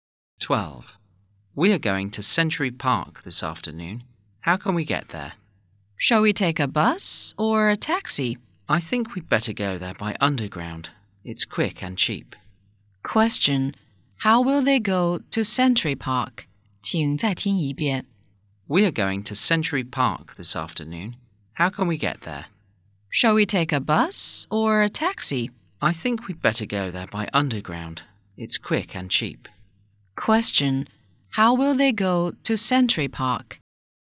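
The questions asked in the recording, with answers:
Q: How will they go to Century Park?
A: By underground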